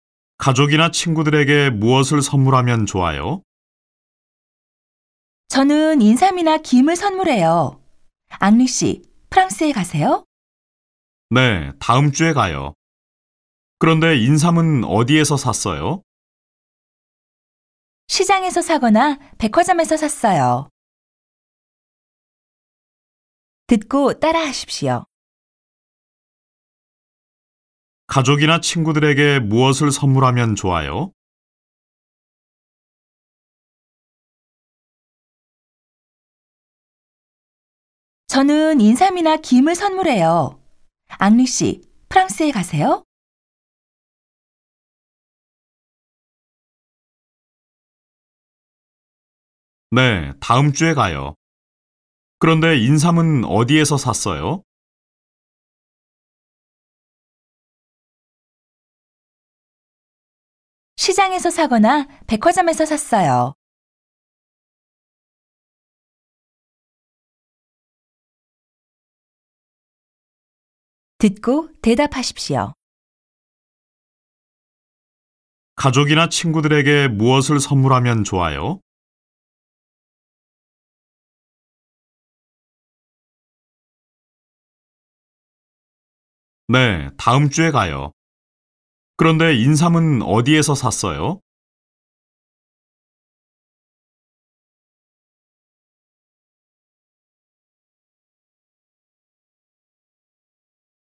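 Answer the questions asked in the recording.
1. 인삼이나 김을 선물해요.
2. 시장에서 사거나 백화점에서 샀어요.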